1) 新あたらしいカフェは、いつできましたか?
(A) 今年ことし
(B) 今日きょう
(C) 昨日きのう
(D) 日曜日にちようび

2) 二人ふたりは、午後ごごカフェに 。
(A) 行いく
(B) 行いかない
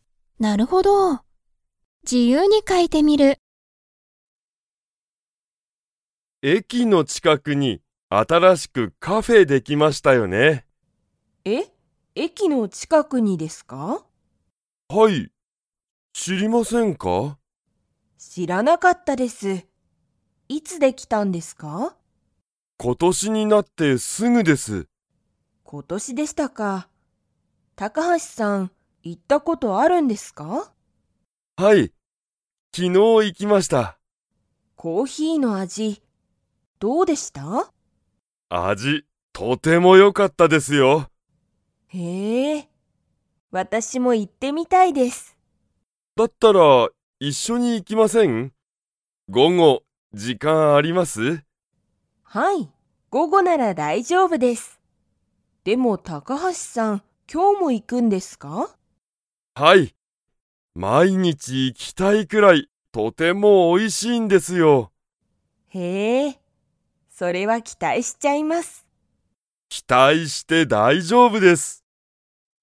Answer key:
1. 今年ことし
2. 行いく

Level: Level 3

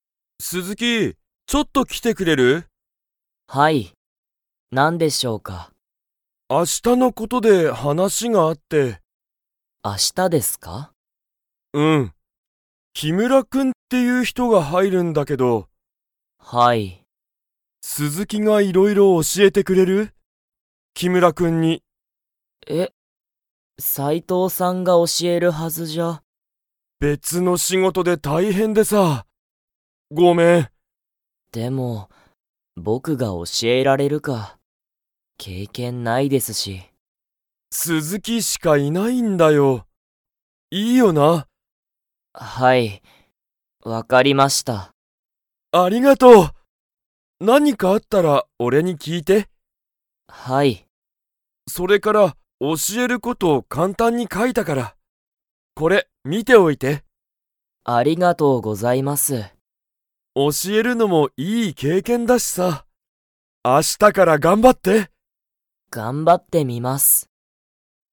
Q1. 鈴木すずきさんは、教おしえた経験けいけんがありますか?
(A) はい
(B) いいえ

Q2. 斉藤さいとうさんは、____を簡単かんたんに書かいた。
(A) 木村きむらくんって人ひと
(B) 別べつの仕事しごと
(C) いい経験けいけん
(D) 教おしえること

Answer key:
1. いいえ
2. 教おしえること

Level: Level 2

